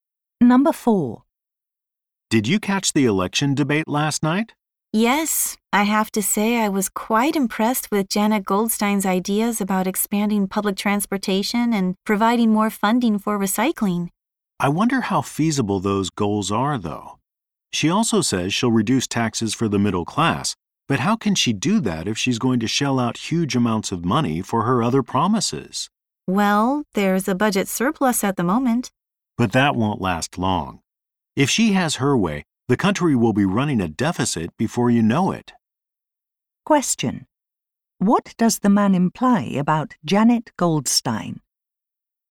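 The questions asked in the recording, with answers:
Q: What does the man imply about Janet Goldstein?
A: Her promises are financially unrealistic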